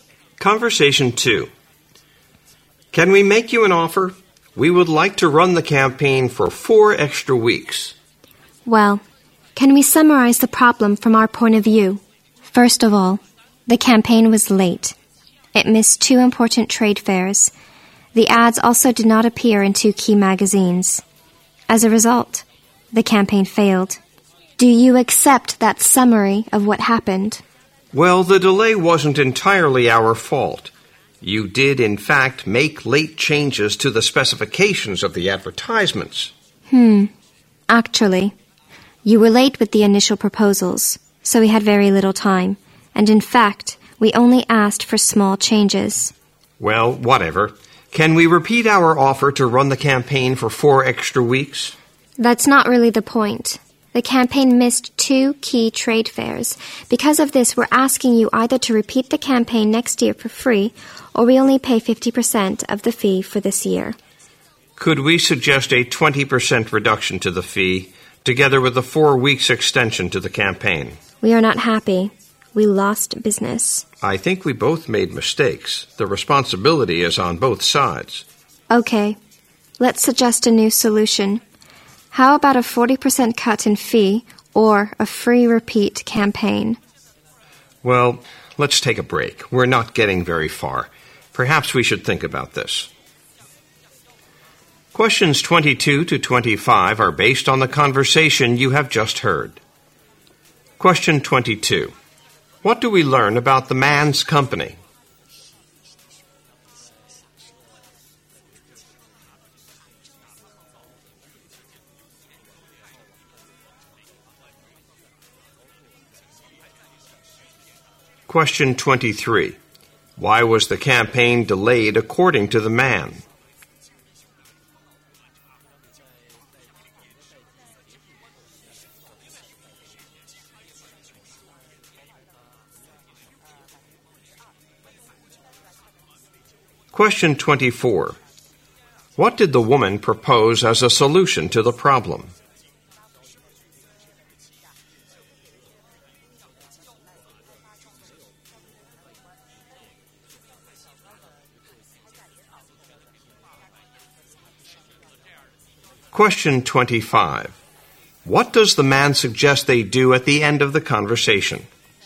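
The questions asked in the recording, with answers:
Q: What do we learn about the man's company?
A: It ran an advertising campaign that was late and failed.

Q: Why was the campaign delayed according to the man?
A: The woman's side made late changes to the ad specifications.

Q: What did the woman propose as a solution to the problem?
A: A free repeat campaign next year, or paying only 50% of this year's fee.

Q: What does the man suggest they do at the end of the conversation?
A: Take a break.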